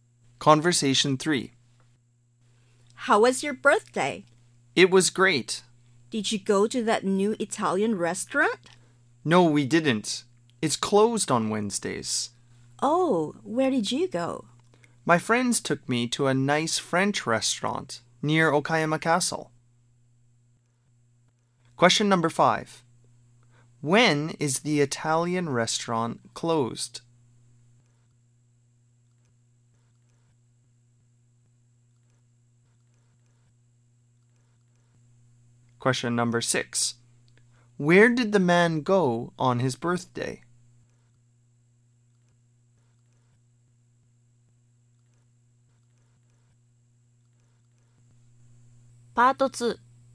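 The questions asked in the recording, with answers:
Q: When is the Italian restaurant closed?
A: On Wednesdays

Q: Where did the man go on his birthday?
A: A French restaurant near Okayama Castle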